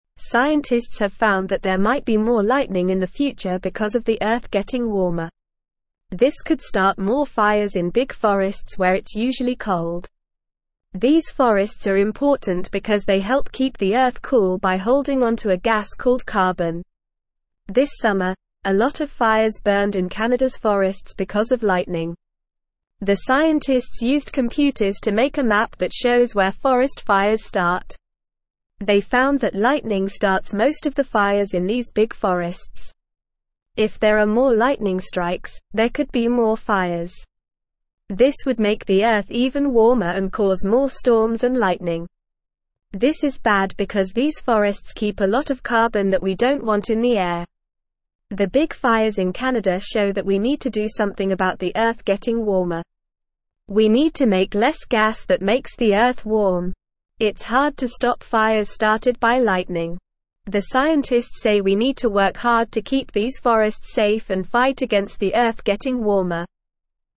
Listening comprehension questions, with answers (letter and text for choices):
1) What might cause more lightning in the future?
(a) Earth getting colder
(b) Earth getting warmer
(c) More trees in the forest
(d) Less storms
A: (b) Earth getting warmer

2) Why are big forests important for keeping the Earth cool?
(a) They make the Earth warmer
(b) They cause more lightning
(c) They start more fires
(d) They hold onto a gas called carbon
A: (d) They hold onto a gas called carbon

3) What caused a lot of fires in Canada's forests this summer?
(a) Human activity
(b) Earth getting colder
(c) Lightning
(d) Heavy rain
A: (c) Lightning

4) How did scientists make a map to show where forest fires start?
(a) They used computers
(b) They used pencils and paper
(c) They used a magnifying glass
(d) They used a telescope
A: (a) They used computers

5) What do the scientists say we need to do about the Earth getting warmer?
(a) Start more fires in the forests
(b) Cut down all the trees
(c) Use more gas that makes the Earth warm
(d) Make less gas that makes the Earth warm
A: (d) Make less gas that makes the Earth warm

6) Why is it hard to stop fires started by lightning?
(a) Lightning starts most of the fires in big forests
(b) There are not enough firefighters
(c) The fires are not dangerous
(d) The fires are easy to put out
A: (a) Lightning starts most of the fires in big forests

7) What do the scientists say we need to work hard to keep safe?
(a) The lightning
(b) The fires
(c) These forests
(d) The storms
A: (c) These forests

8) What is bad about the Earth getting warmer and causing more storms and lightning?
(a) The Earth becomes colder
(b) These forests keep a lot of carbon that we don't want in the air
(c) The forests become smaller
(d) The air becomes cleaner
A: (b) These forests keep a lot of carbon that we don't want in the air

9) Scientists have found that there might be more (1)______ in the future because of the Earth getting warmer.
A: lightning

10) This could start more fires in big (2)______ where it's usually cold.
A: forests

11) These forests are (3)______ because they help keep the Earth cool by holding onto a gas called carbon.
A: important

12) This summer, a lot of (4)______ (5)______ in Canada's forests because of lightning.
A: fires

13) This summer, a lot of (4)______ (5)______ in Canada's forests because of lightning.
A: burned

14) The scientists (6)______ computers to make a map that shows where forest fires start.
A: used

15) This would make the Earth even warmer and (7)______ more storms and lightning.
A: cause

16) This is bad because these forests (8)______ a lot of carbon that we don't want in the air.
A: keep

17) The big fires in Canada (9)______ that we (10)______ to do something about the Earth getting (11)______er.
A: show

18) The big fires in Canada (9)______ that we (10)______ to do something about the Earth getting (11)______er.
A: need

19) The big fires in Canada (9)______ that we (10)______ to do something about the Earth getting (11)______er.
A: warm

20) It's (12)______ to stop fires started by lightning.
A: hard

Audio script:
Scientists have found that there might be more lightning in the future because of the Earth getting warmer. This could start more fires in big forests where it's usually cold. These forests are important because they help keep the Earth cool by holding onto a gas called carbon. This summer, a lot of fires burned in Canada's forests because of lightning.
The scientists used computers to make a map that shows where forest fires start. They found that lightning starts most of the fires in these big forests. If there are more lightning strikes, there could be more fires. This would make the Earth even warmer and cause more storms and lightning. This is bad because these forests keep a lot of carbon that we don't want in the air.
The big fires in Canada show that we need to do something about the Earth getting warmer. We need to make less gas that makes the Earth warm. It's hard to stop fires started by lightning. The scientists say we need to work hard to keep these forests safe and fight against the Earth getting warmer.

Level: Level 2